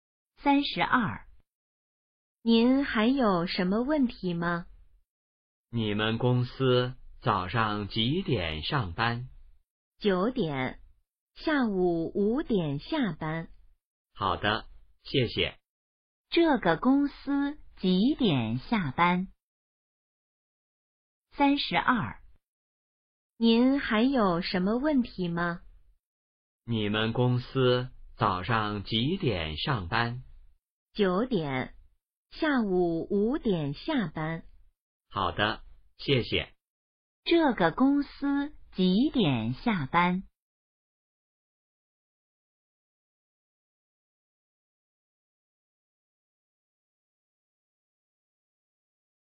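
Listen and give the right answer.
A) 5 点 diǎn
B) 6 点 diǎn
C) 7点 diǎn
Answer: A) 5 点 diǎn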